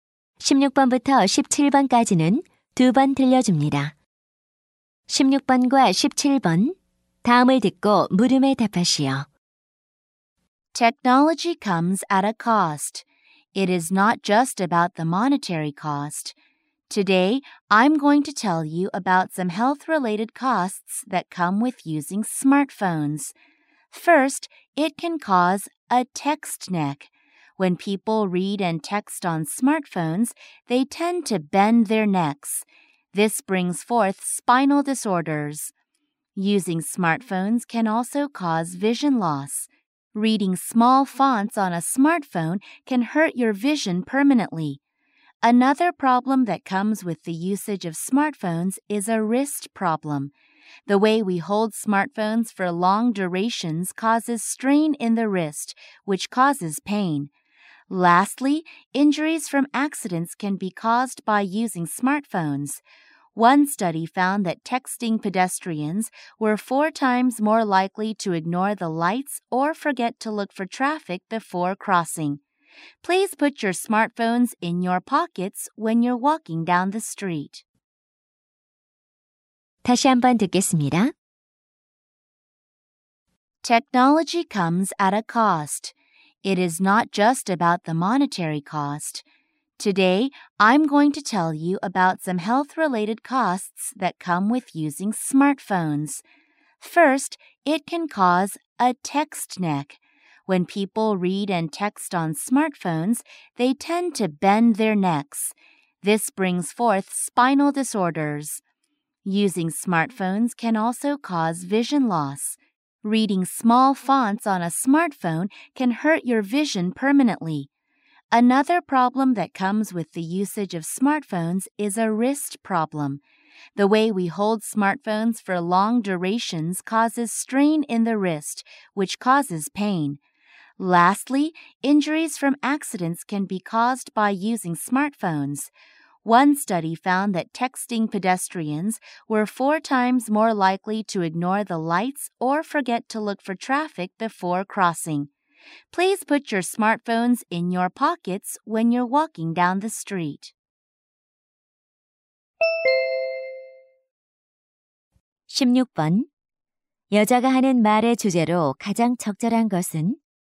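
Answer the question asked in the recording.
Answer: 스마트폰 사용으로 생기는 건강 문제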